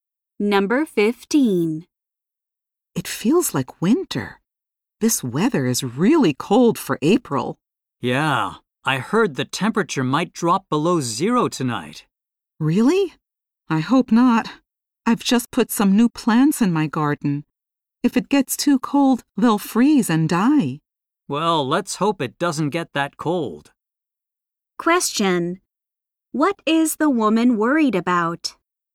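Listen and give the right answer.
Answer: Her new garden plants may freeze and die.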